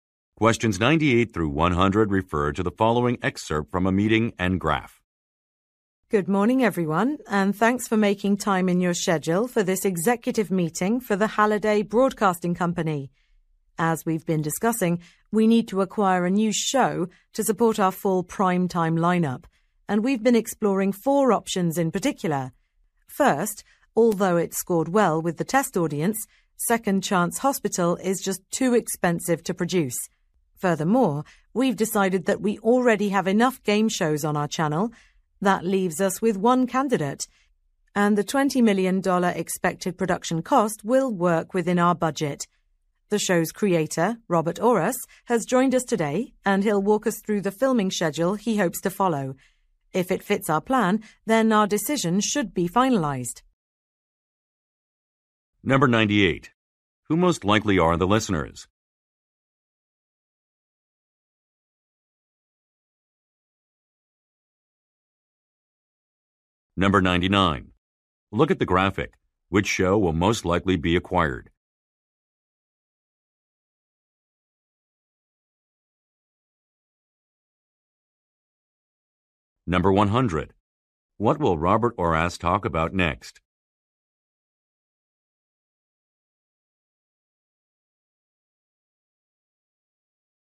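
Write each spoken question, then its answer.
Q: Who most likely are the listeners?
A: Broadcasting company executives

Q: What will Robert Orris talk about next?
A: The filming schedule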